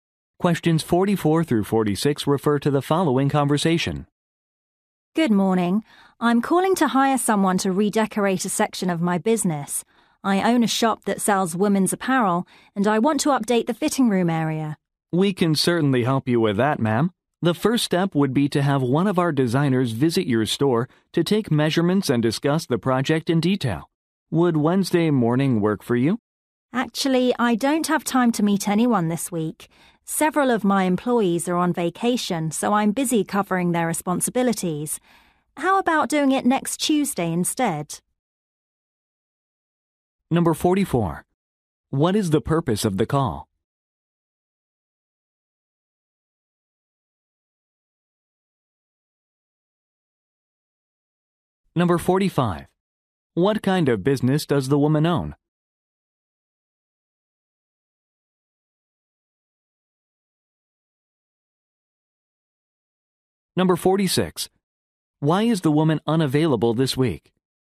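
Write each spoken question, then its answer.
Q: What is the purpose of the call?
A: To hire someone to redecorate part of her shop

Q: What kind of business does the woman own?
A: A women's clothing shop

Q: Why is the woman unavailable this week?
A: She is covering for employees who are on vacation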